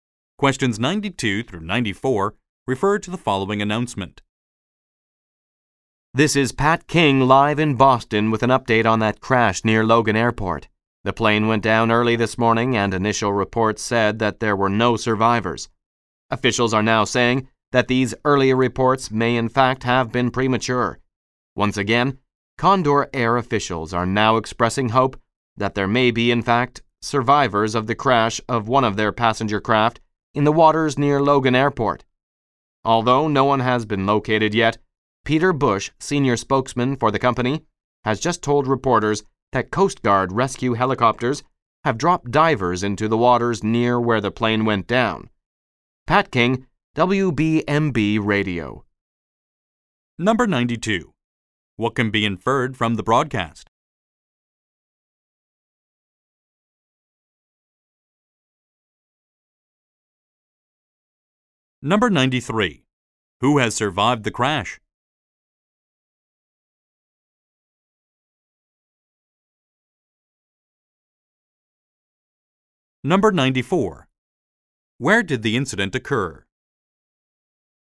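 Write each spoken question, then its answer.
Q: Who has survived the crash?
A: No survivors have been found yet

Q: Where did the incident occur?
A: In the waters near Logan Airport, Boston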